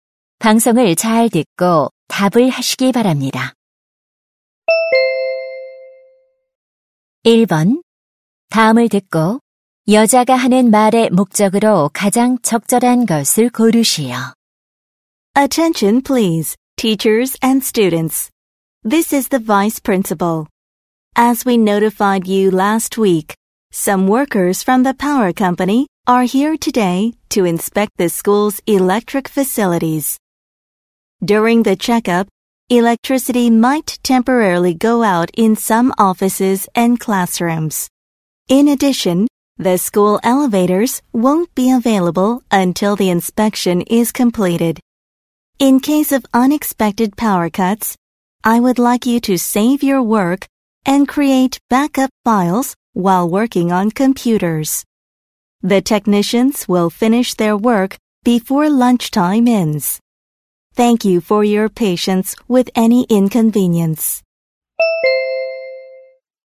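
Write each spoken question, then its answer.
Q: 다음을 듣고 여자가 하는 말의 목적으로 가장 적절한 것을 고르시오.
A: 전기 설비 점검으로 인한 정전 가능성과 엘리베이터 사용 불가를 안내하려고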